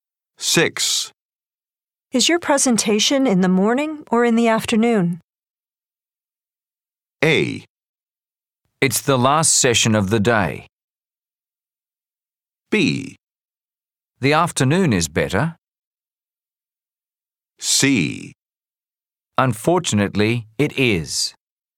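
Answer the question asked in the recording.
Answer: A: It's the last session of the day.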